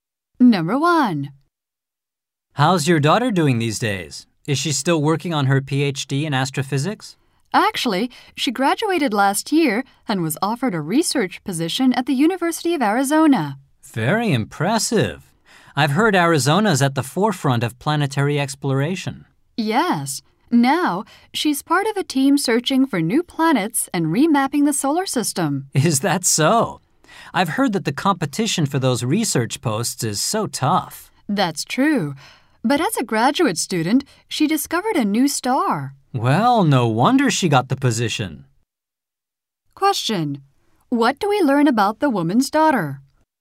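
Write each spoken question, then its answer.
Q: What do we learn about the woman's daughter?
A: She discovered a new star as a graduate student and got a research position at the University of Arizona.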